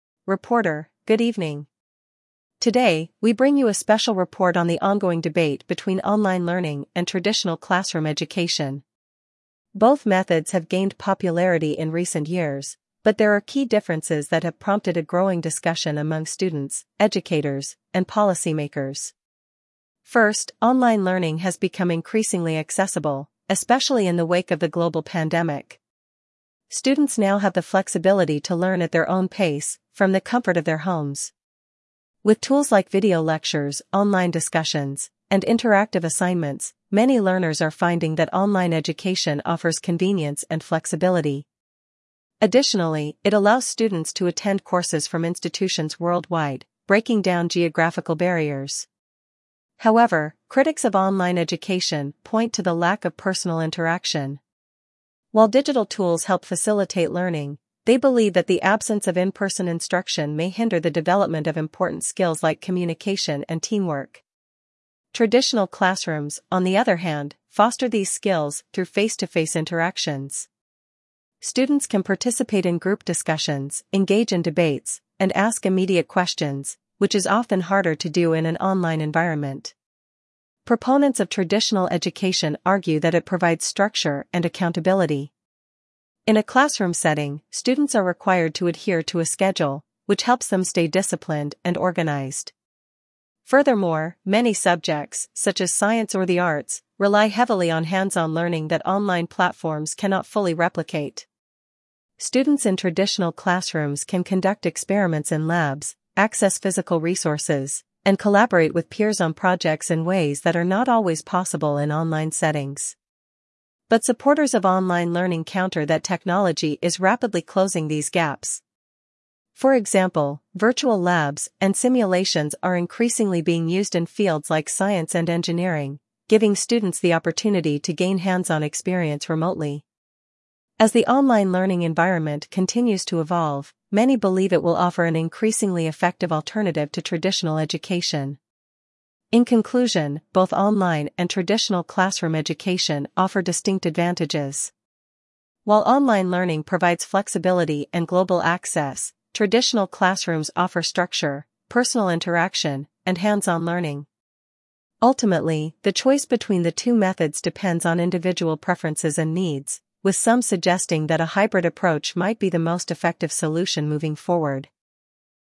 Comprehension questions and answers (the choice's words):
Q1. What is one of the key benefits of online learning mentioned in the report?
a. Immediate feedback from instructors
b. Flexibility to learn at one's own pace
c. Hands-on learning experiences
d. Access to physical resources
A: Flexibility to learn at one's own pace

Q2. What concern do critics of online learning express?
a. The quality of the online course material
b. Lack of personal interaction and collaboration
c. High cost of online programs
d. Limited course variety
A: Lack of personal interaction and collaboration

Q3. What does traditional classroom education provide that online learning may not?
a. Convenience and accessibility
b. Structure, accountability, and immediate communication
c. Virtual tools and online assignments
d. Global access to institutions worldwide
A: Structure, accountability, and immediate communication

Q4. How do supporters of online learning address the concern about hands-on experience?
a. By offering more live lectures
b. By emphasizing the use of virtual labs and simulations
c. By encouraging students to attend in-person workshops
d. By limiting the scope of the course material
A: By emphasizing the use of virtual labs and simulations

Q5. What is suggested as a possible solution moving forward?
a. Making all education online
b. Using traditional classrooms exclusively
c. A hybrid model combining both online and traditional education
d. Reducing the role of technology in education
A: A hybrid model combining both online and traditional education

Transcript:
Reporter: Good evening. Today, we bring you a special report on the ongoing debate between online learning and traditional classroom education. Both methods have gained popularity in recent years, but there are key differences that have prompted a growing discussion among students, educators, and policymakers.
First, online learning has become increasingly accessible, especially in the wake of the global pandemic. Students now have the flexibility to learn at their own pace, from the comfort of their homes. With tools like video lectures, online discussions, and interactive assignments, many learners are finding that online education offers convenience and flexibility. Additionally, it allows students to attend courses from institutions worldwide, breaking down geographical barriers.
However, critics of online education point to the lack of personal interaction. While digital tools help facilitate learning, they believe that the absence of in-person instruction may hinder the development of important skills like communication and teamwork. Traditional classrooms, on the other hand, foster these skills through face-to-face interactions. Students can participate in group discussions, engage in debates, and ask immediate questions, which is often harder to do in an online environment.
Proponents of traditional education argue that it provides structure and accountability. In a classroom setting, students are required to adhere to a schedule, which helps them stay disciplined and organized. Furthermore, many subjects, such as science or the arts, rely heavily on hands-on learning that online platforms cannot fully replicate. Students in traditional classrooms can conduct experiments in labs, access physical resources, and collaborate with peers on projects in ways that are not always possible in online settings.
But supporters of online learning counter that technology is rapidly closing these gaps. For example, virtual labs and simulations are increasingly being used in fields like science and engineering, giving students the opportunity to gain hands-on experience remotely. As the online learning environment continues to evolve, many believe it will offer an increasingly effective alternative to traditional education.
In conclusion, both online and traditional classroom education offer distinct advantages. While online learning provides flexibility and global access, traditional classrooms offer structure, personal interaction, and hands-on learning. Ultimately, the choice between the two methods depends on individual preferences and needs, with some suggesting that a hybrid approach might be the most effective solution moving forward.